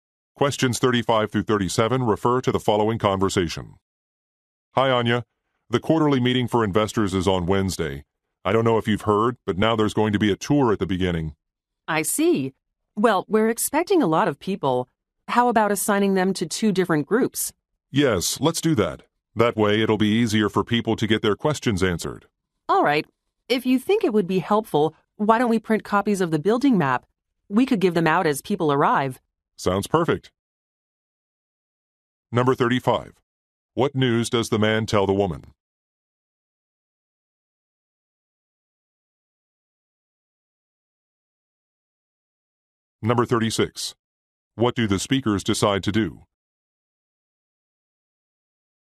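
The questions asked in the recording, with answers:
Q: What news does the man tell the woman?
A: There will be a tour at the beginning of the meeting

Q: What do the speakers decide to do?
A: Divide people into two groups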